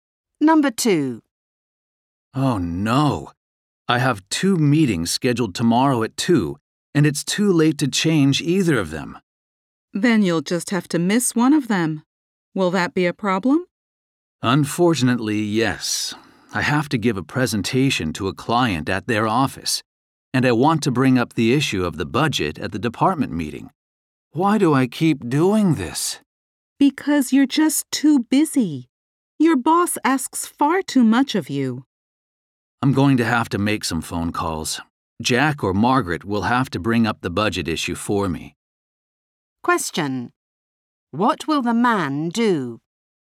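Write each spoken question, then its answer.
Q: What will the man do?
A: Ask Jack or Margaret to raise the budget issue at the department meeting for him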